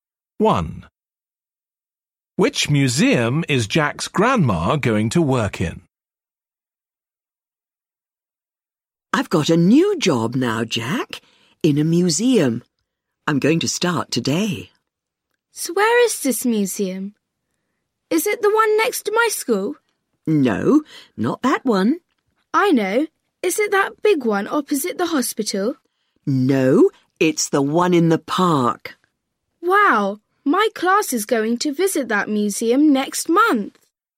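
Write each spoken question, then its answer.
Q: Which museum is Jack's grandma going to work in?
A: the one in the park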